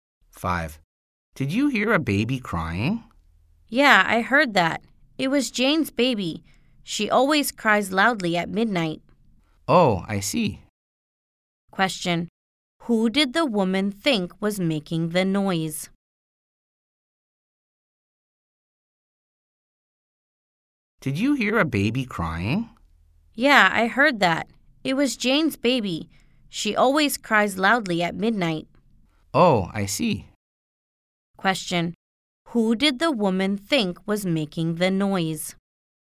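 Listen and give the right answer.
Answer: Jane's baby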